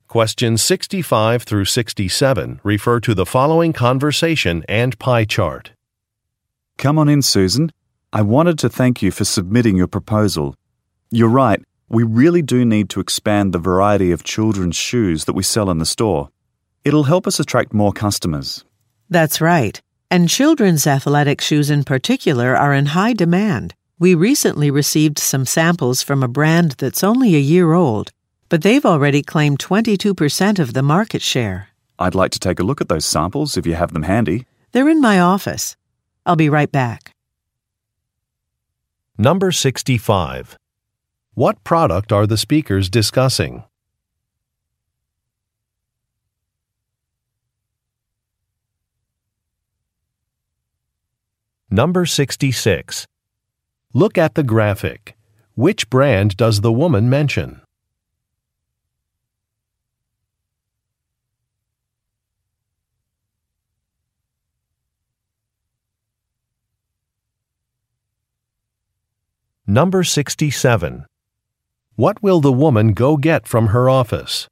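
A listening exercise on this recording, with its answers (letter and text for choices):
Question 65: What product are the speakers discussing?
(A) Kitchen appliances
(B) Children's shoes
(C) Photo editing software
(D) Gardening tools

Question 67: What will the woman go get from her office?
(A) Some samples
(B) Some data reports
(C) A key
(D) A résumé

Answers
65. (B) Children's shoes
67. (A) Some samples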